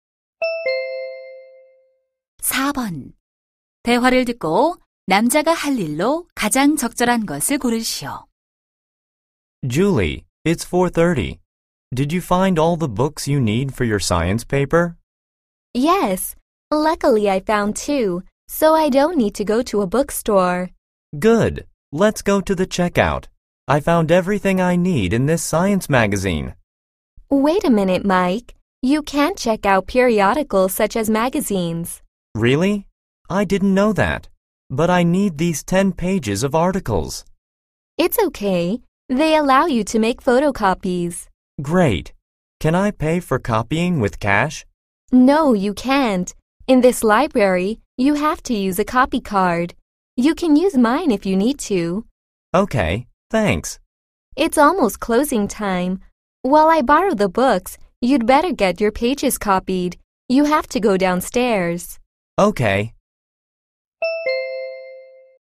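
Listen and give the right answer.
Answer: 잡지 기사 복사하기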